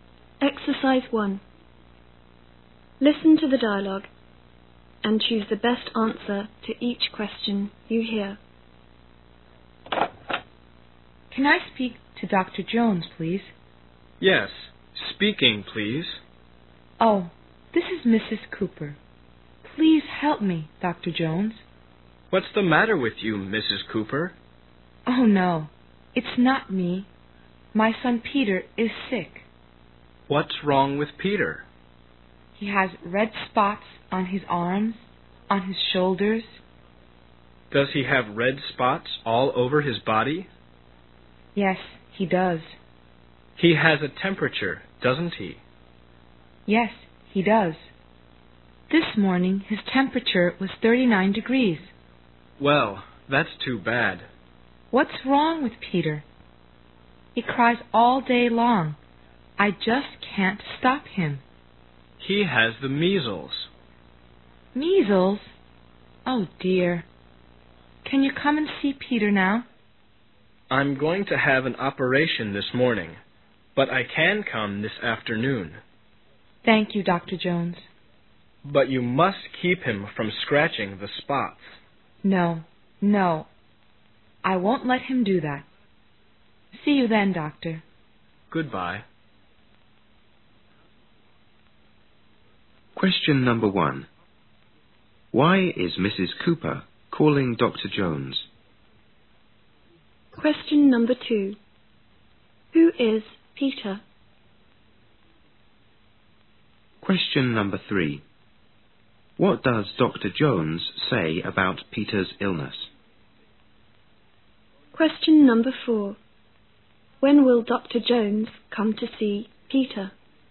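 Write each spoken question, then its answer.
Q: Why is Mrs. Cooper calling Dr. Jones?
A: Her son Peter is sick

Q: Who is Peter?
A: Mrs. Cooper's son

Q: What does Dr. Jones say about Peter's illness?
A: He has the measles

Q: When will Dr. Jones come to see Peter?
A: This afternoon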